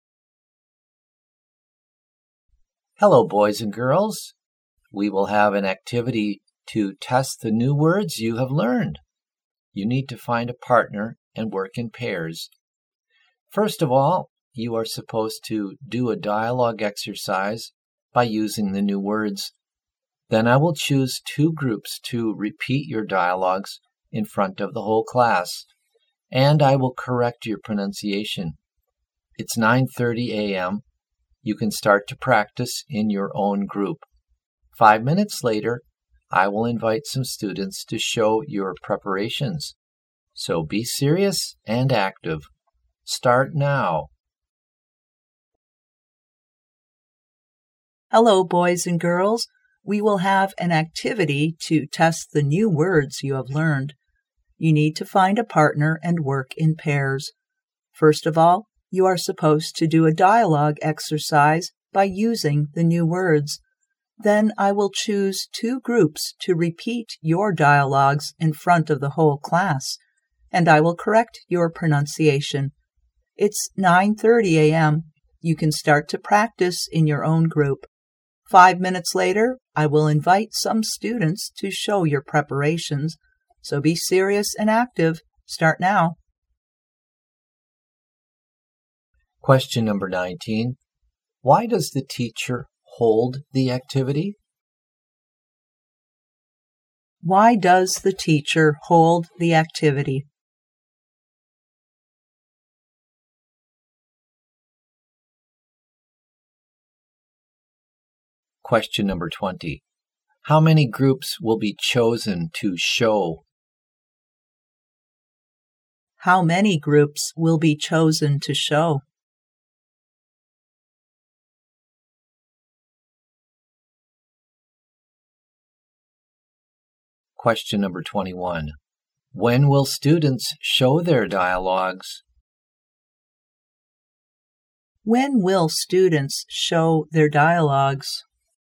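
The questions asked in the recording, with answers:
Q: Why does the teacher hold the activity?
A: To test the new words students have learned

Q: How many groups will be chosen to show?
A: Two

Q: When will students show their dialogues?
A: At 9:35 a.m.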